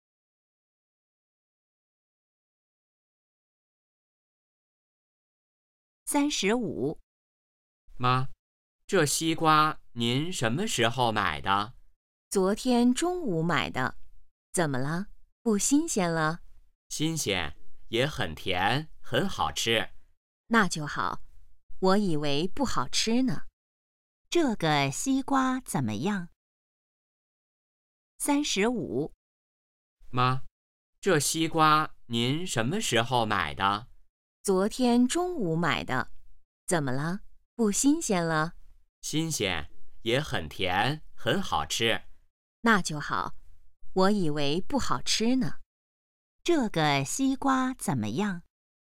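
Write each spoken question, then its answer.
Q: 这个西瓜怎么样?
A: 新鲜,很甜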